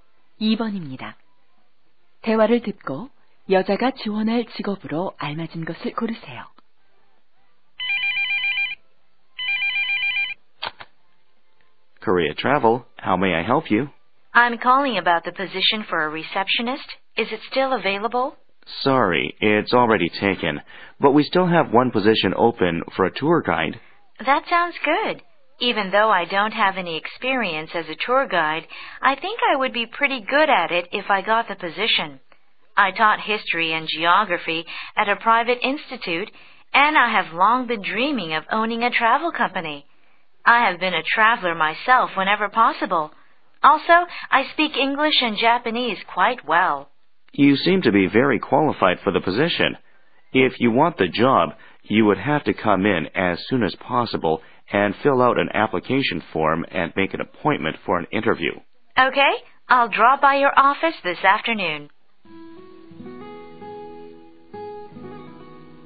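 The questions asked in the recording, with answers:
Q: 대화를 듣고 여자가 지원할 직업으로 알맞은 것을 고르세요.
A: 여행 가이드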